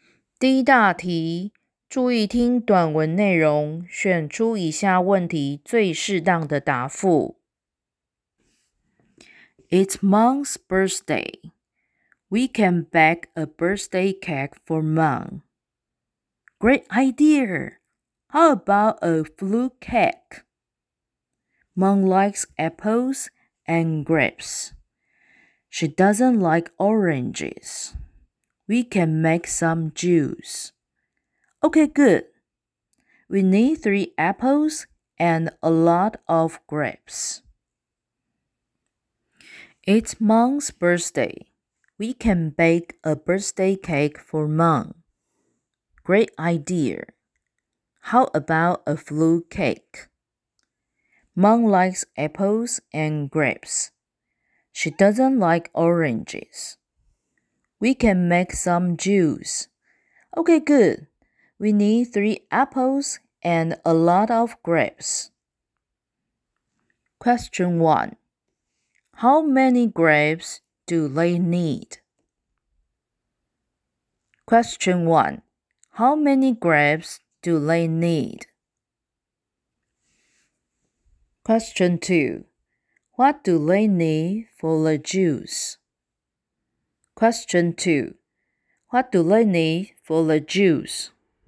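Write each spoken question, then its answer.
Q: How many grapes do they need?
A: A lot of grapes

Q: What do they need for the juice?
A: 3 apples and a lot of grapes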